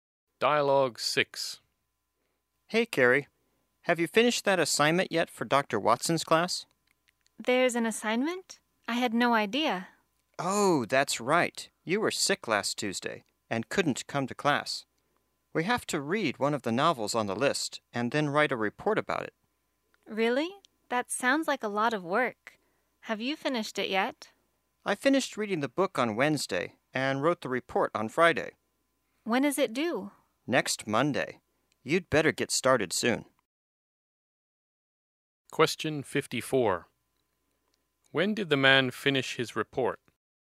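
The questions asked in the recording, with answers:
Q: When did the man finish his report?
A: On Friday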